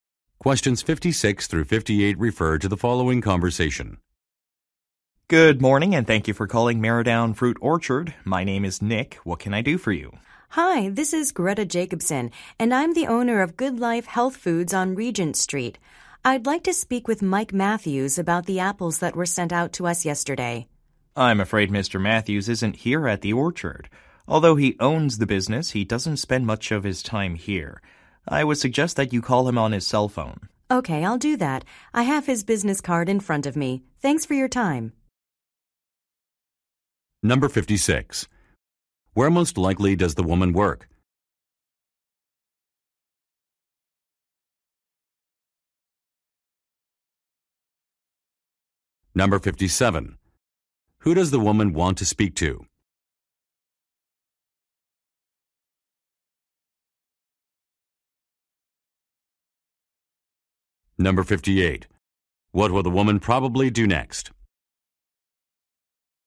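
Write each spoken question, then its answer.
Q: Where most likely does the woman work?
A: At a health food store

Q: Who does the woman want to speak to?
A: Mike Matthews, the owner of the orchard

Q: What will the woman probably do next?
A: Call Mr. Matthews on his cell phone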